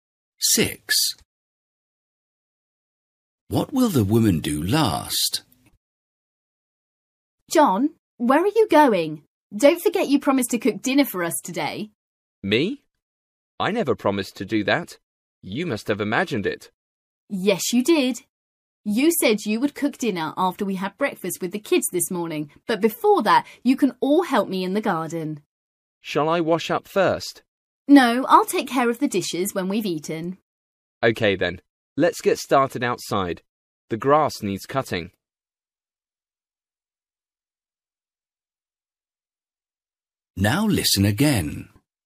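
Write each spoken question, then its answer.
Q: What will the woman do last?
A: Wash the dishes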